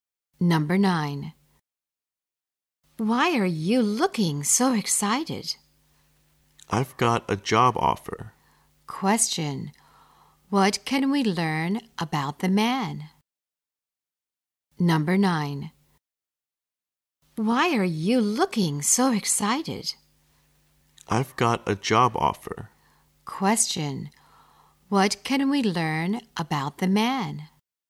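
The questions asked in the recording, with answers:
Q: what can we learn about the man?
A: He has got a job offer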